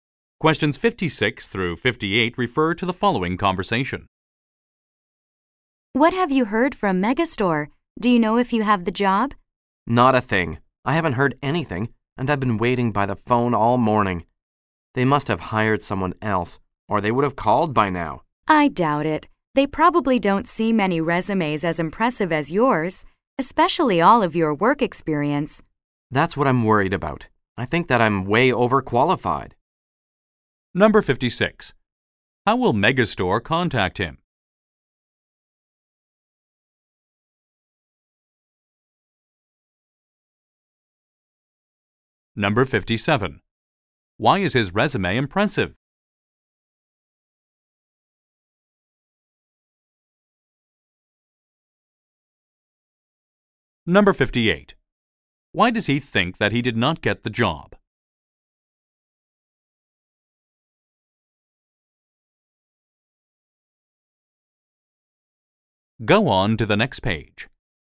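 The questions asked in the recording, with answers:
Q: How will Megastore contact him?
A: By phone

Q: Why is his resume impressive?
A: His work experience

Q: Why does he think that he did not get the job?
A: He is overqualified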